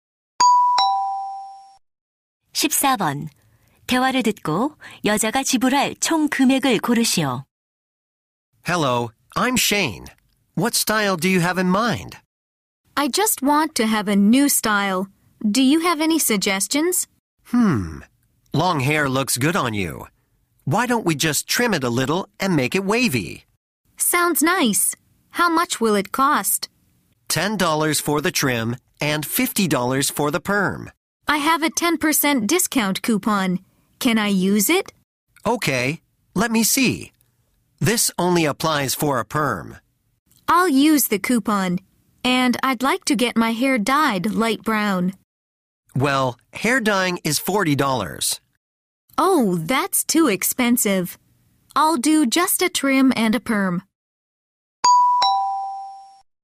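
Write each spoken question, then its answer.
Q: 대화를 듣고 여자가 지불할 총 금액을 고르시오.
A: 55달러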